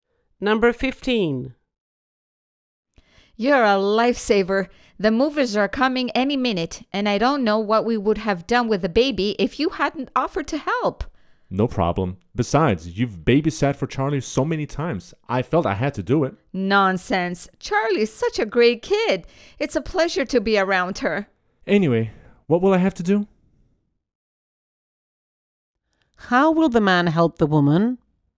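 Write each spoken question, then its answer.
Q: How will the man help the woman?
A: By looking after her baby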